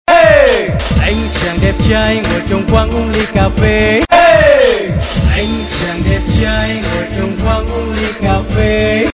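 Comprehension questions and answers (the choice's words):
B. Translate with the right words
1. "Sitting down with a glass of coffee" is said:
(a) ... ngồi trong quán cà phê uống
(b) ... ngồi trên quán uống ly cà phê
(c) ... ngồi trong quán uống ly cà phê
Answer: ... ngồi trong quán uống ly cà phê

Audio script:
1. Anh chàng đẹp trai ngồi trong quán uống ly cà phê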